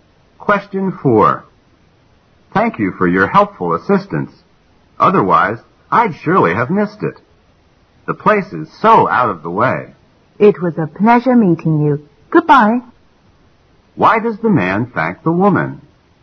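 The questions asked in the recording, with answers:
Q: Why does the man thank the woman?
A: She helped him find a place that was hard to find

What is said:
Q: What does the woman mean?
M: Thank you for your helpful assistance. Otherwise, I'd surely have missed it. The place is so out of the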